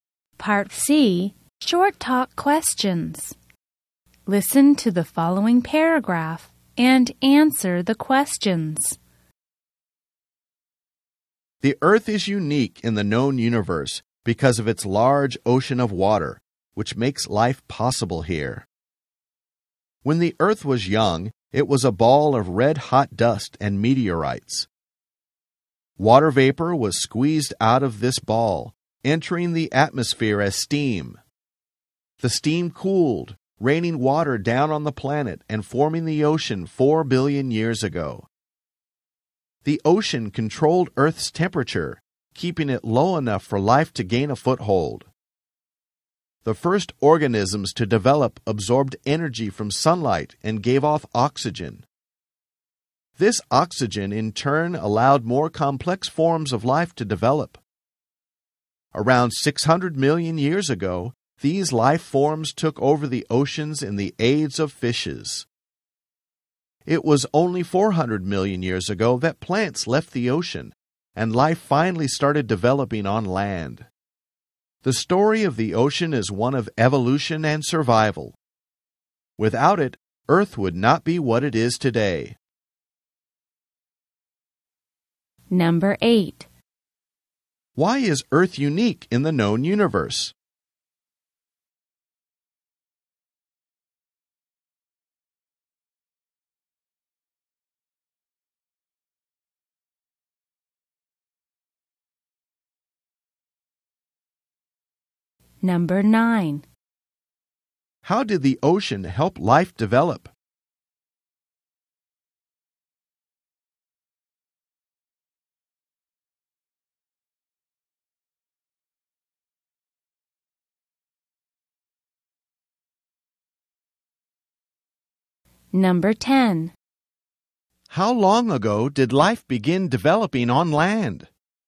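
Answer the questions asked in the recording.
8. Because of its large ocean of water, which makes life possible.
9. It controlled Earth's temperature, keeping it low enough for life.
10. 400 million years ago.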